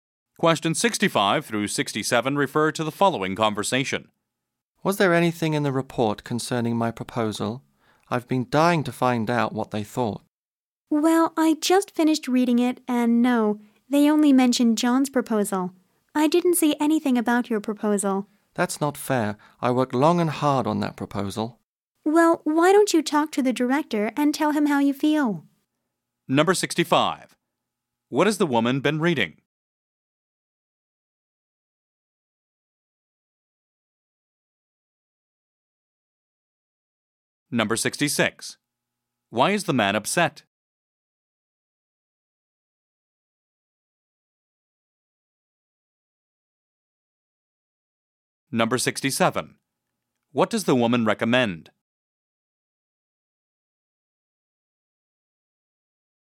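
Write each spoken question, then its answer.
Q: What has the woman been reading?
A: A report

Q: Why is the man upset?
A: His proposal wasn't mentioned

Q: What does the woman recommend?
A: Talking to the director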